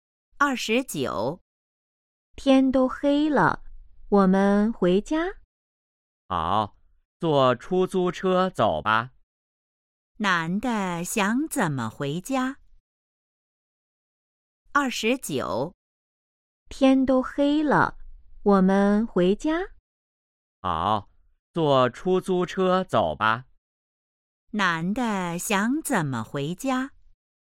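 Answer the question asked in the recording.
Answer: 坐出租车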